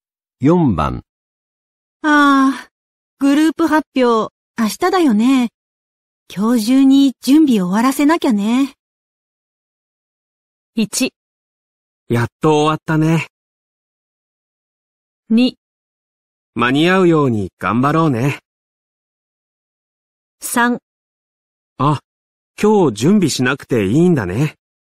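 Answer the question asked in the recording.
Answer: 2: 間に合うように頑張ろうね。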